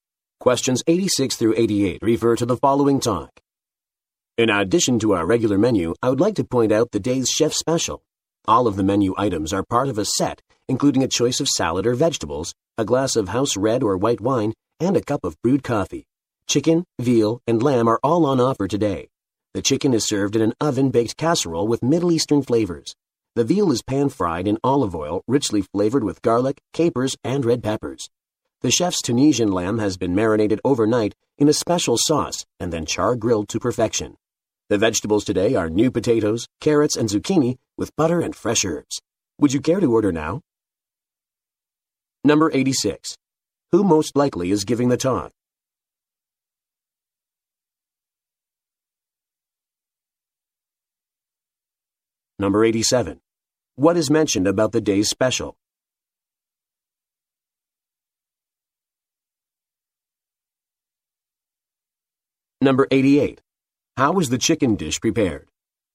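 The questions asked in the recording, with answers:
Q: Who most likely is giving the talk?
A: A waiter

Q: What is mentioned about the day's special?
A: Menu items come as a set with salad or vegetables, wine and coffee

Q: How is the chicken dish prepared?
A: Oven-baked casserole with Middle Eastern flavors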